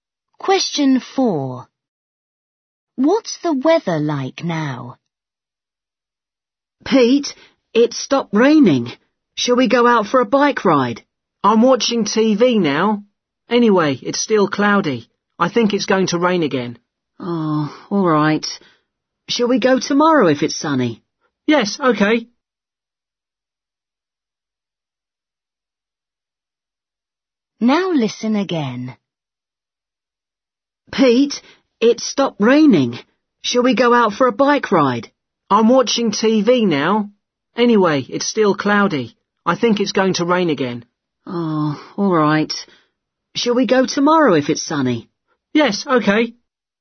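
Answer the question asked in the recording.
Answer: cloudy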